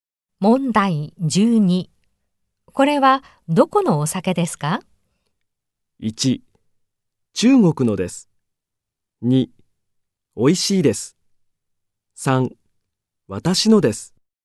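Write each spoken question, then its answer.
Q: これはどこのお酒ですか?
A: 1: 中国のです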